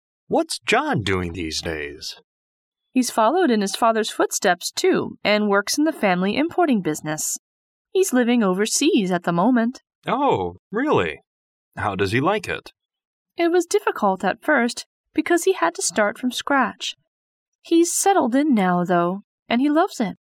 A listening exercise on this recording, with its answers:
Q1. Why was John's business difficult at first?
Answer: He had to start from the very beginning without help.

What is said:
M: What's John doing these days?
W: He's followed in his father's footsteps too and works in the family importing business. He's living overseas at the moment.
M: Oh, really? How does he like it?
W: It was difficult at first because he had to start from scratch. He's settled in now, though, and he loves it.